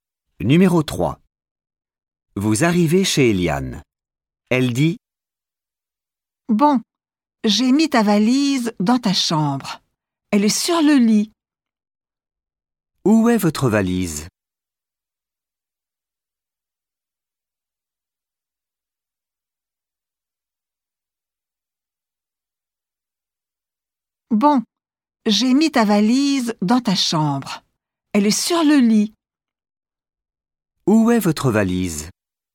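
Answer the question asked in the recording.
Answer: Sur le lit, dans la chambre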